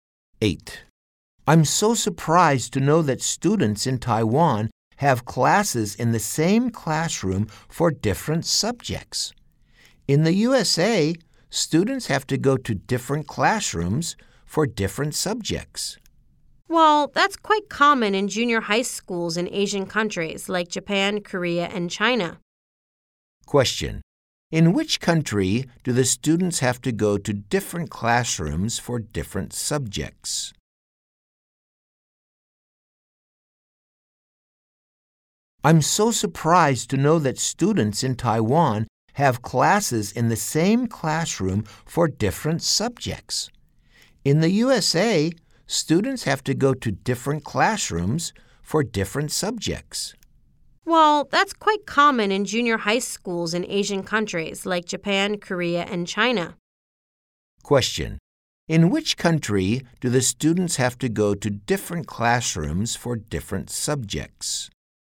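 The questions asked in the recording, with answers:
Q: In which country do the students have to go to different classrooms for different subjects?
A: The USA.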